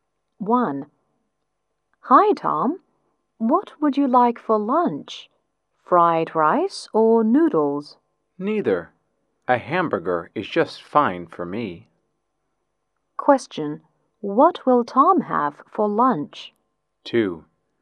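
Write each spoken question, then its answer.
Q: What will Tom have for lunch?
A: A hamburger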